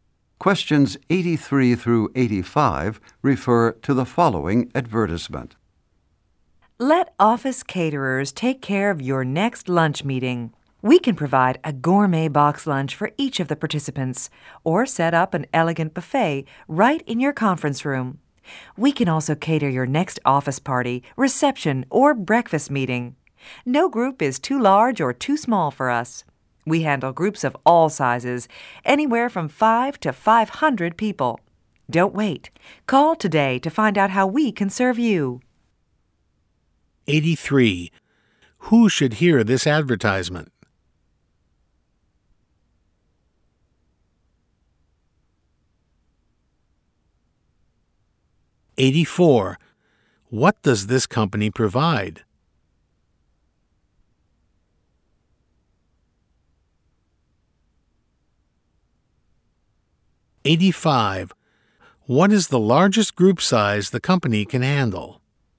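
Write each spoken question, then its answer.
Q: What does this company provide?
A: Catering (box lunches and buffets)

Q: What is the largest group size the company can handle?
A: 500 people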